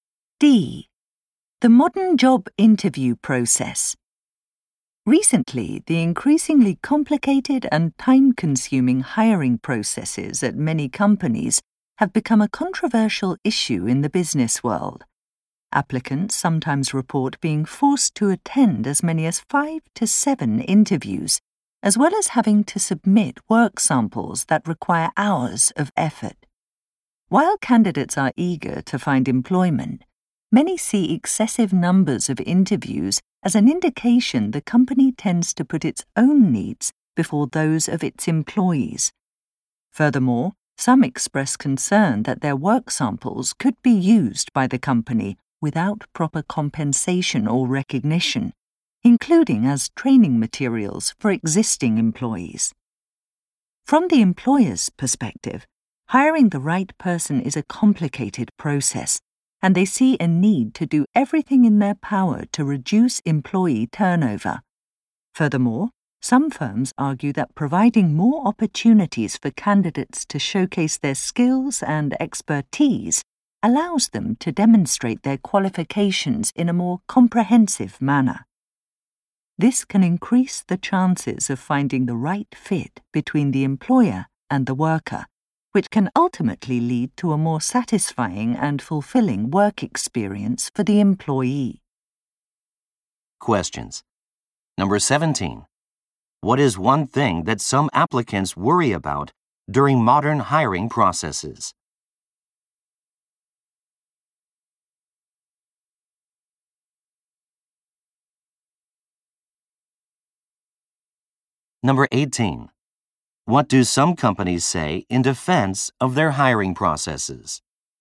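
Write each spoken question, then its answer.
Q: What is one thing that some applicants worry about during modern hiring processes?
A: The company might use their work samples without paying them or giving them credit.

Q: What do some companies say in defense of their hiring processes?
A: The processes let candidates show their skills more fully, which helps find the right fit and reduces employee turnover.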